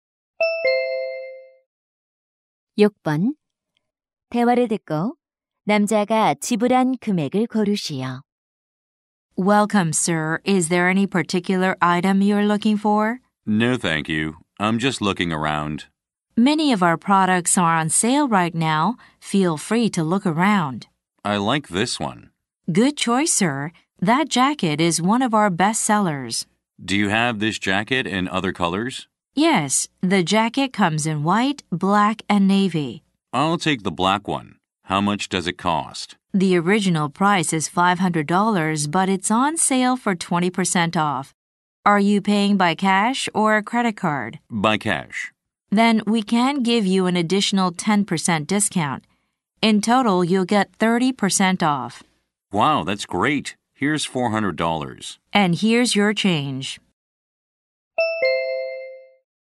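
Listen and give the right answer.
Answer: $350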